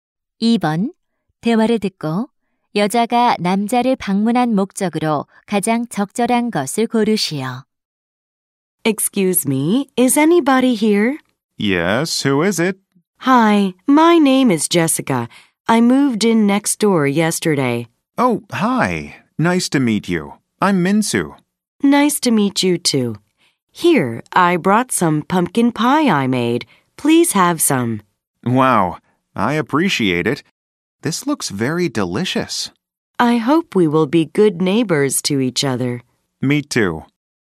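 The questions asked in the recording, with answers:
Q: 대화를 듣고 여자가 남자를 방문한 목적으로 가장 적절한 것을 고르시오.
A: 이웃에게 인사하고 직접 만든 호박파이를 주려고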